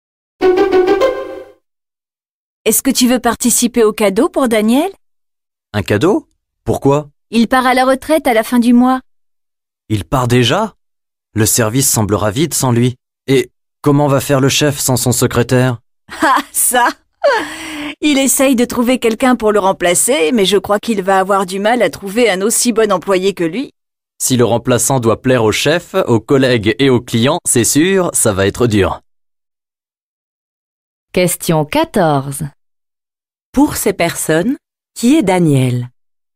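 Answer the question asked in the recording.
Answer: Un collègue, le secrétaire du chef, qui part à la retraite.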